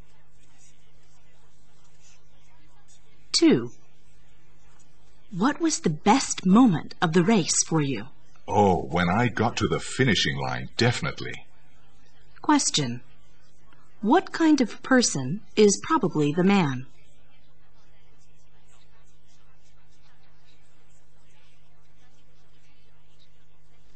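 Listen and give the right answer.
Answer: A runner (an athlete in a race)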